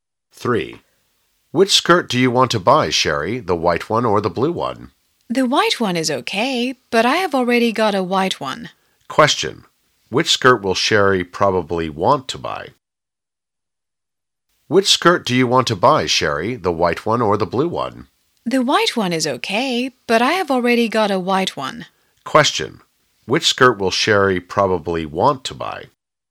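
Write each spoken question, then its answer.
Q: Which skirt will Sherry probably want to buy?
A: The blue one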